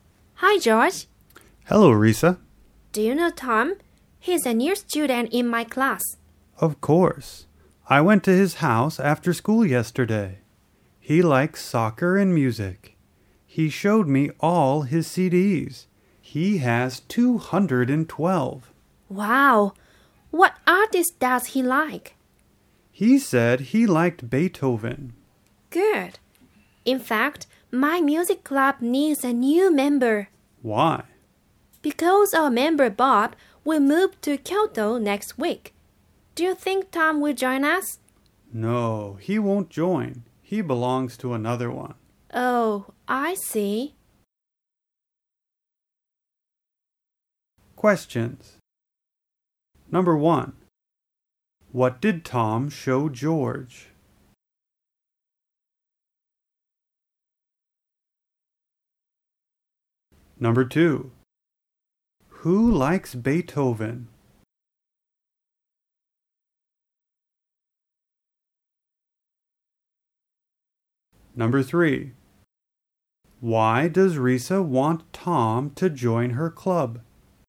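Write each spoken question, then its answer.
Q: what did Tom show George?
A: All his CDs

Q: who likes Beethoven?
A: Tom

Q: why does Risa want Tom to join her club?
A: Because the club needs a new member since Bob will move to Kyoto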